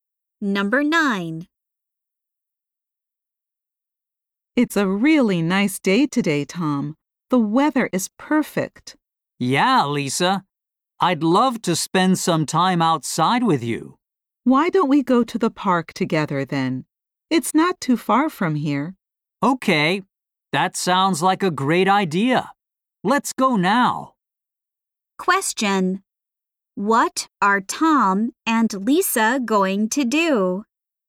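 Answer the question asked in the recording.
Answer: Go to the park together.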